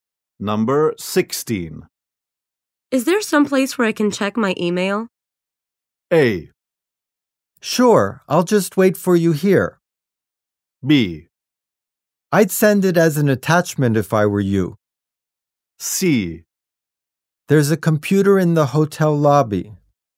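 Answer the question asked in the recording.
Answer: C: There's a computer in the hotel lobby.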